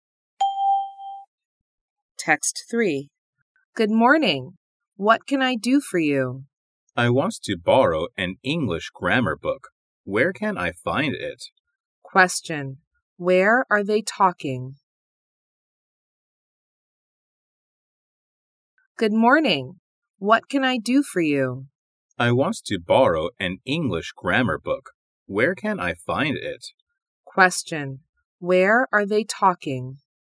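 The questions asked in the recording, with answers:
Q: Where are they talking?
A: In a library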